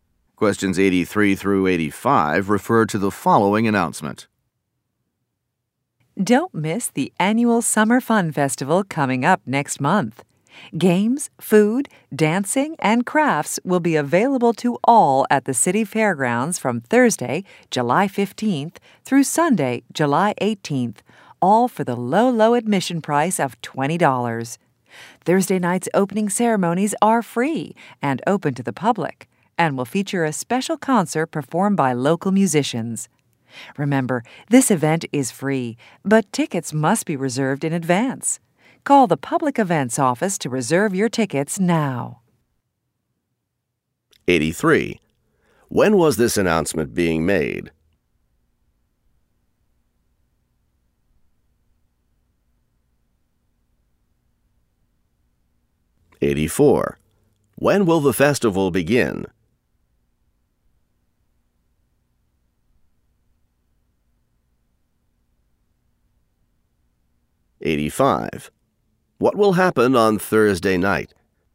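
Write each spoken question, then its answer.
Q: When was this announcement being made?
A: In June

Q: When will the festival begin?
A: Thursday, July 15th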